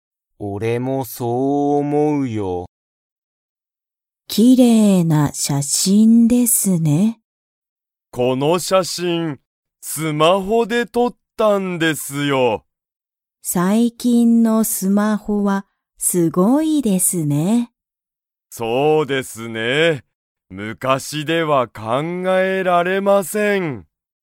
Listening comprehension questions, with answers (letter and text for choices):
Comprehension Quiz (Skip if you don't understand the conversation yet)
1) 最近(さいきん)のスマホは____。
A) すごい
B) 大(おお)きい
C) 楽(たの)しい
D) かわいい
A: A) すごい